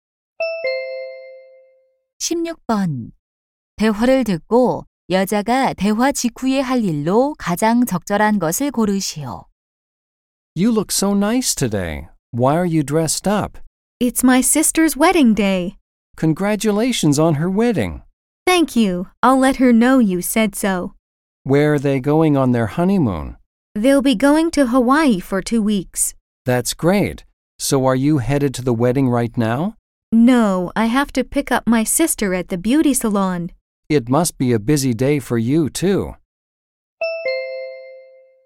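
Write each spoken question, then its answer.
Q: 대화를 듣고 여자가 대화 직후에 할 일로 가장 적절한 것을 고르시오.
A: 미용실에서 언니를 데려오기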